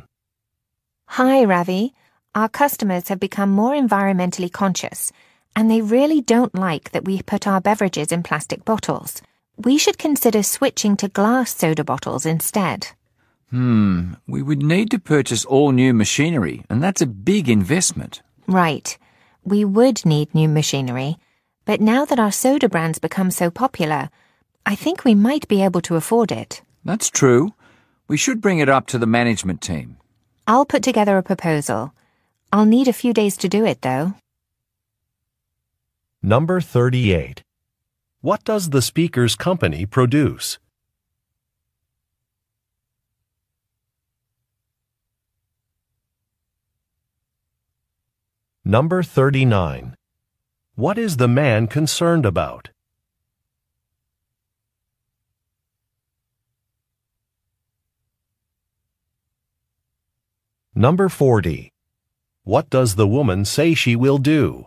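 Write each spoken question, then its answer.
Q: What does the speaker's company produce?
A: Beverages (soda)

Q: What is the man concerned about?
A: The big cost of buying new machinery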